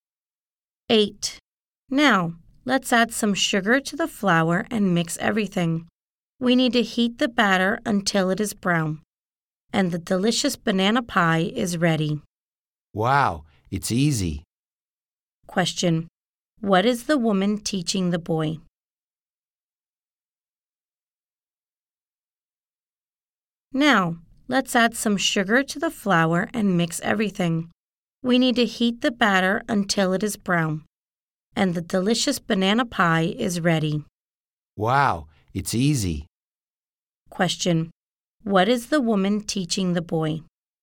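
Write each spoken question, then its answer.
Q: What is the woman teaching the boy?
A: How to make a banana pie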